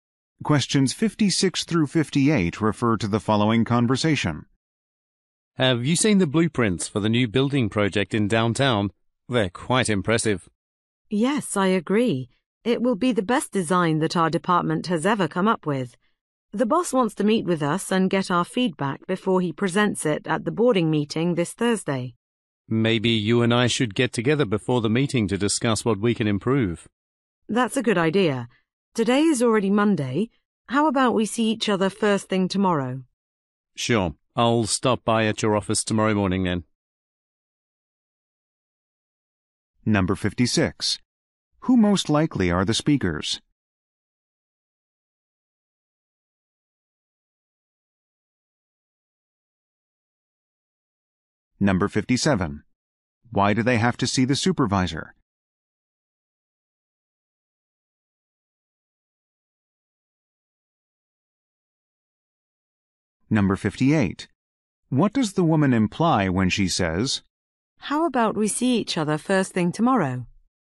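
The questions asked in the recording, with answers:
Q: Why do they have to see the supervisor?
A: To give feedback on the blueprints before the board meeting

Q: What does the woman imply when she says,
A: She wants to meet early tomorrow morning to discuss improvements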